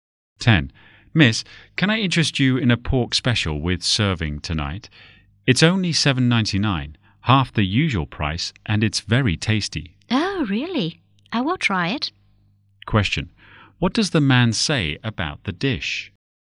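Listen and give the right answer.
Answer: It is cheap (half price) and very tasty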